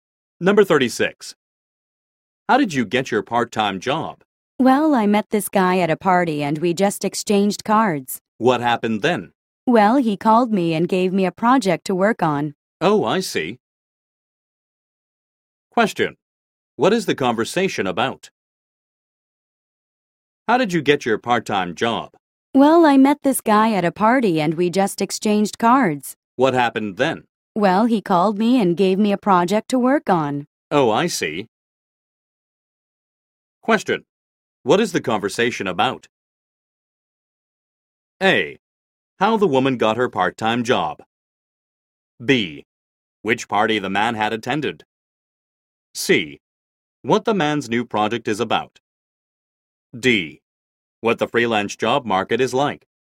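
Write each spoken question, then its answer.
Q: What is the conversation about?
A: A: How the woman got her part-time job.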